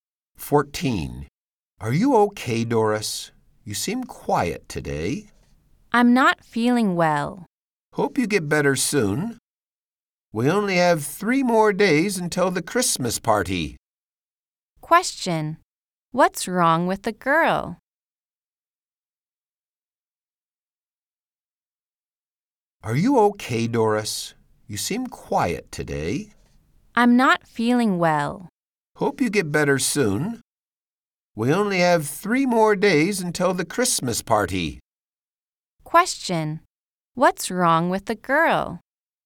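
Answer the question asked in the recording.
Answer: She is not feeling well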